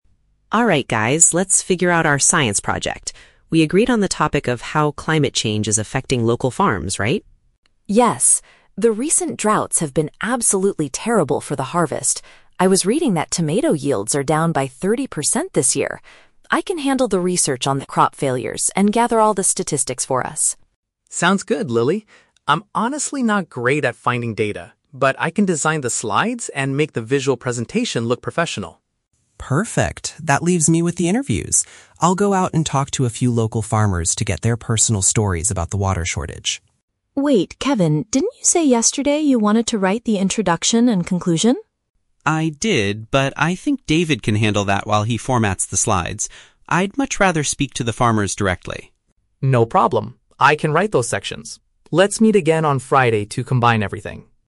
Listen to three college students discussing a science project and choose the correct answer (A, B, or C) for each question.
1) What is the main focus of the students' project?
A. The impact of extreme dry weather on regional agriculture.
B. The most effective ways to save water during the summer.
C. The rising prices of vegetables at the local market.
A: A

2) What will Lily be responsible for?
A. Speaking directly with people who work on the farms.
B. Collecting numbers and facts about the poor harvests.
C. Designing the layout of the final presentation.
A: B

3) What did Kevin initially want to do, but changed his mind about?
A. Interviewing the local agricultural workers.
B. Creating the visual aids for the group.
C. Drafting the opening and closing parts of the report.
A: C

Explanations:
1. The students are discussing how "climate change is affecting local farms" and specifically mention "recent droughts." (Paraphrasing: extreme dry weather = droughts; regional agriculture = local farms). Why the trap is wrong: Option (B) is a trap. "Water shortage" is mentioned in the audio, but they are studying its effects on farms, not looking for ways to save water. Option (C) is plausible because they mention tomatoes, but prices are not discussed.
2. Lily states, "I can handle the research on the crop failures and gather all the statistics." (Paraphrasing: numbers and facts = statistics; poor harvests = crop failures). Why the trap is wrong: Option (A) is a trap because this is Kevin's job (talking to local farmers). Option (C) is a trap because this is David's job (designing the slides/visual presentation).
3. Lily asks Kevin, "didn't you say yesterday you wanted to write the introduction and conclusion?" and Kevin confirms he did, but now he is giving that task to David. (Paraphrasing: opening and closing parts = introduction and conclusion; drafting = write). Why the trap is wrong: Option (A) is the trap. Kevin is doing the interviews now, but the question asks what he initially wanted to do but changed his mind about. Option (B) is David's task from the beginning.

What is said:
Kevin: Alright guys, let's figure out our science project. We agreed on the topic of how climate change is affecting local farms, right?
Lily: Yes. The recent droughts have been absolutely terrible for the harvest. I was reading that tomato yields are down by 30% this year. I can handle the research on the crop failures and gather all the statistics for us.
David: Sounds good, Lily. I'm honestly not great at finding data, but I can design the slides and make the visual presentation look professional.
Kevin: Perfect. That leaves me with the interviews. I'll go out and talk to a few local farmers to get their personal stories about the water shortage.
Lily: Wait, Kevin, didn't you say yesterday you wanted to write the introduction and conclusion?
Kevin: I did, but I think David can handle that while he formats the slides. I'd much rather speak to the farmers directly.

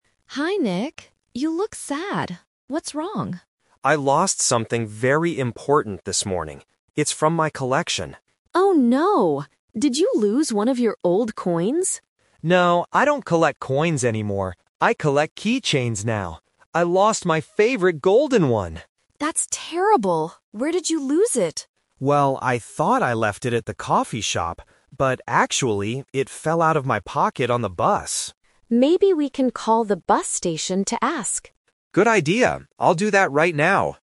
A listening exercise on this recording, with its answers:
Listen to a conversation between two friends. Choose the correct answer (A, B, or C).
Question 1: What does Nick collect now?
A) Old coins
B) Keychains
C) Bus tickets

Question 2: Which item from his collection did Nick lose?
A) A silver coin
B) A plastic keychain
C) A golden keychain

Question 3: Where did Nick drop his item?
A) At the coffee shop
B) On the bus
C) At the bus station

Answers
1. B
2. C
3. B

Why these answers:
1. Nick says clearly about his current hobby: "I collect keychains now."
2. Nick describes the missing item: "I lost my favorite golden one!" (golden = made of gold / gold-colored).
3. Nick confirms exactly where it happened: "...actually, it fell out of my pocket on the bus."

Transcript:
Emma: Hi Nick. You look sad. What's wrong?
Nick: I lost something very important this morning. It's from my collection.
Emma: Oh no. Did you lose one of your old coins?
Nick: No, I don't collect coins anymore. I collect keychains now. I lost my favorite golden one!
Emma: That's terrible. Where did you lose it?
Nick: Well, I thought I left it at the coffee shop. But actually, it fell out of my pocket on the bus.
Emma: Maybe we can call the bus station to ask.
Nick: Good idea. I'll do that right now.

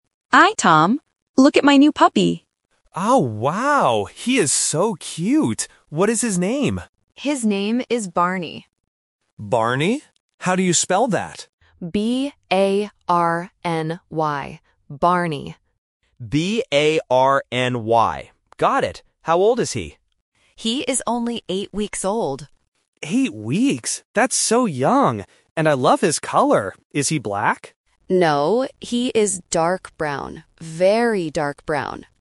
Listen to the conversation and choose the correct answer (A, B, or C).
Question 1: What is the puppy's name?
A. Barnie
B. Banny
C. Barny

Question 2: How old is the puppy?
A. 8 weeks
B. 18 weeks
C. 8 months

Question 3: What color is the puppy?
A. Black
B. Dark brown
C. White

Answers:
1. C
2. A
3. B

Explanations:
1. The woman clearly spells the name B-A-R-N-Y. Option (A) has the wrong spelling (Trap: sounds exactly the same but spelled differently). Option (B) is a slightly different sound.
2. The woman says "He is only eight weeks old" and the man repeats "Eight weeks?". Option (B) "18 weeks" is a trap because the sound "eight" and "eighteen" are often confused by A1 learners. Option (C) "8 months" is a trap using the correct number but the wrong unit of time.
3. The woman says "he is dark brown". Option (A) "Black" is a trap because the man asks "Is he black?" but the woman says "No". Option (C) "White" is not mentioned in the audio at all.

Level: A1

